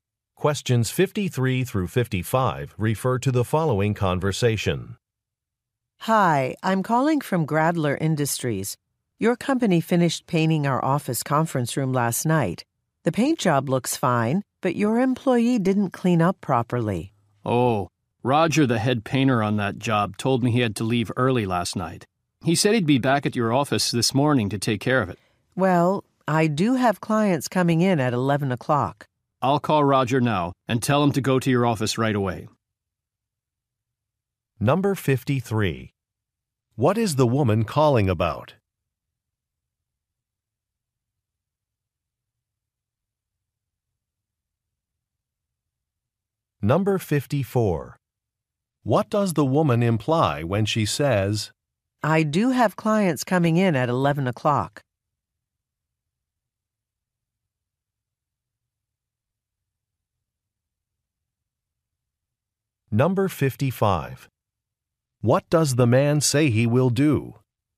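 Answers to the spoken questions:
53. The painters didn't clean up properly
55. Call Roger and send him to her office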